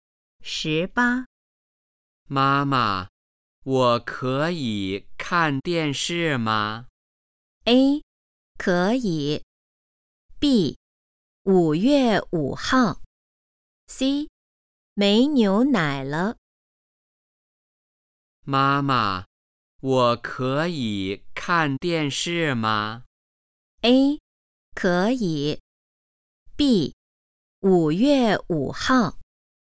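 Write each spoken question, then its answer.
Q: 妈妈,我可以看电视吗?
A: A: 可以。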